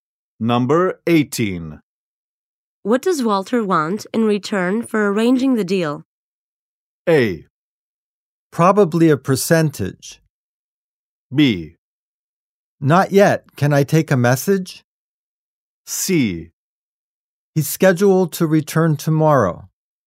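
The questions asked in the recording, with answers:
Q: What does Walter want in return for arranging the deal?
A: A: Probably a percentage.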